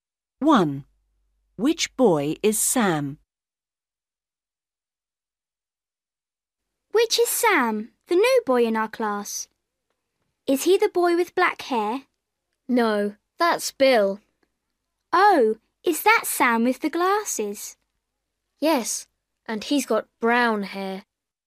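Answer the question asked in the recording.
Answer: the boy with glasses and brown hair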